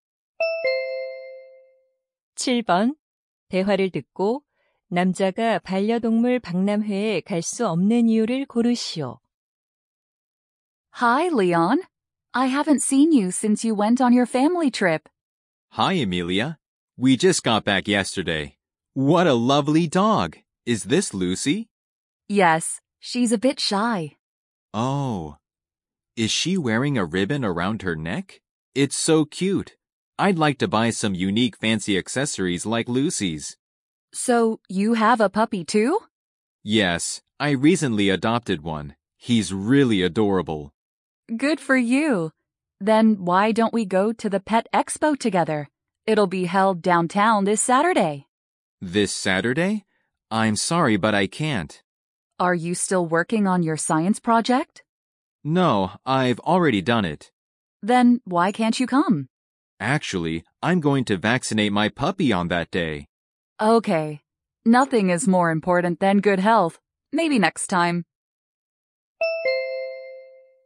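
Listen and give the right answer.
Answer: 강아지에게 예방 접종을 시켜야 해서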